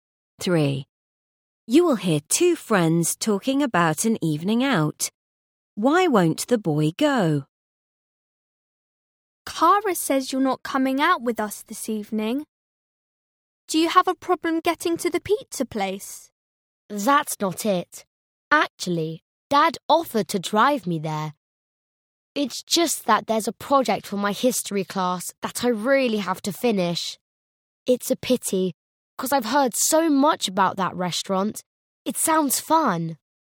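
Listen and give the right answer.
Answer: he has to finish a history project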